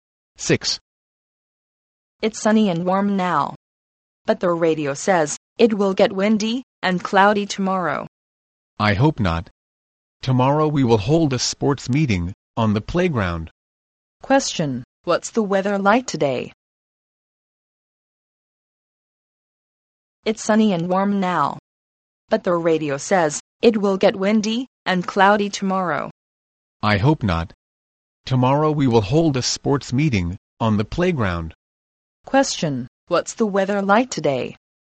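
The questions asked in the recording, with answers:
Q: Question, what's the weather like today?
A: Sunny and warm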